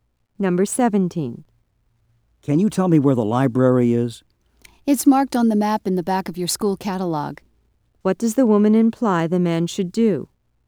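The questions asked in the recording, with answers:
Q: What does the woman imply the man should do?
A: Look at the map in the back of his school catalog.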